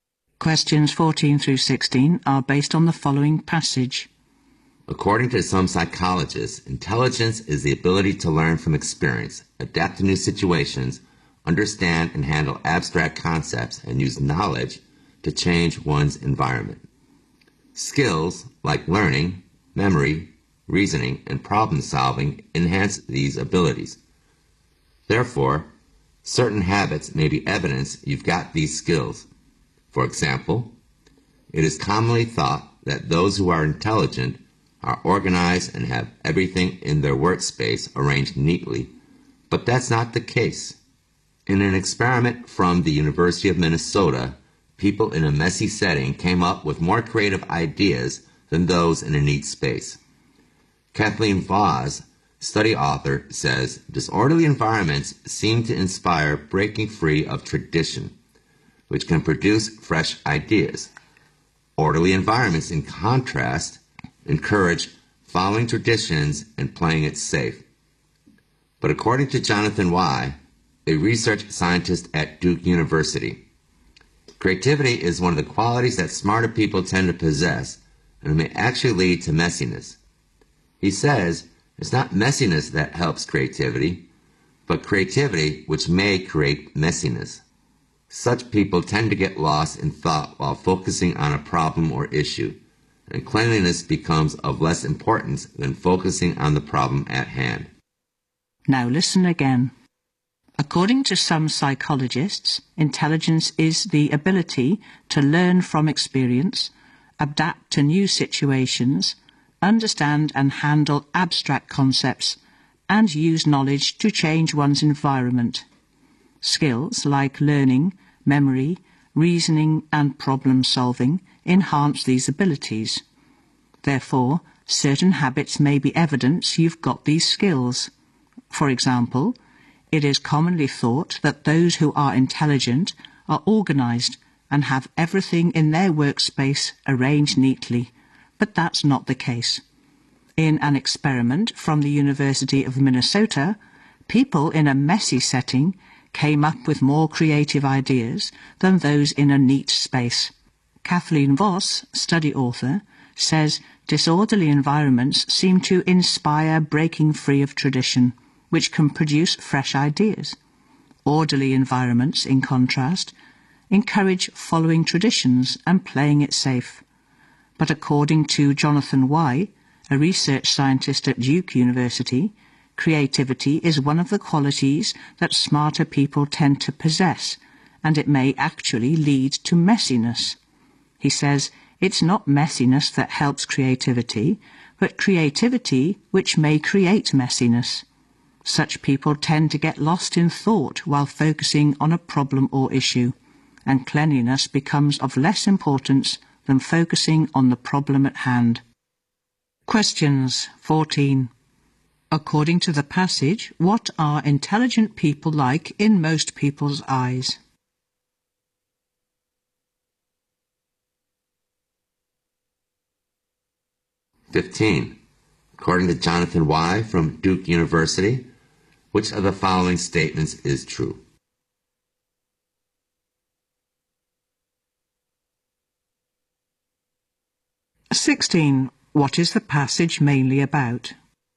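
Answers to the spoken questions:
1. Organized and neat
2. Creativity may lead to messiness
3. The link between messiness and intelligence/creativity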